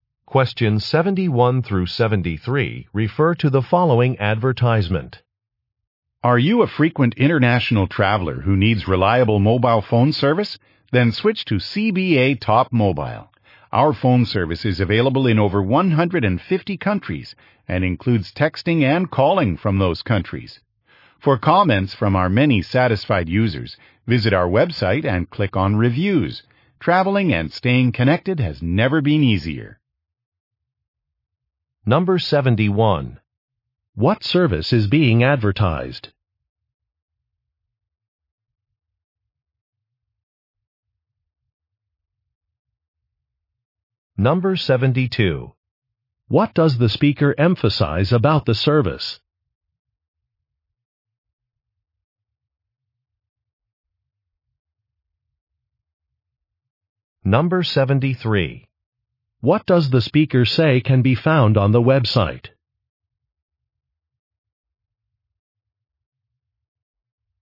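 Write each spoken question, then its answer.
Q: What service is being advertised?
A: International mobile phone service

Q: What does the speaker say can be found on the website?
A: Customer reviews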